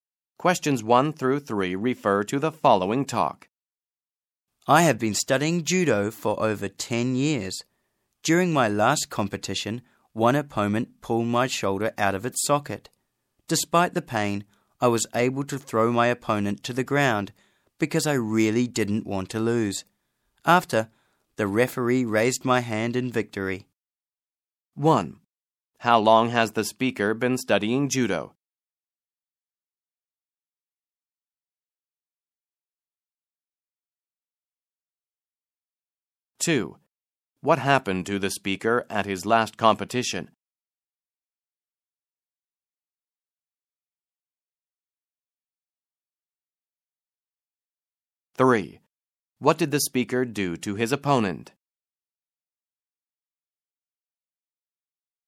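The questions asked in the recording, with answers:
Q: How long has the speaker been studying judo?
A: For over 10 years

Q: What happened to the speaker at his last competition?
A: An opponent pulled his shoulder out of its socket

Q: What did the speaker do to his opponent?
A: He threw his opponent to the ground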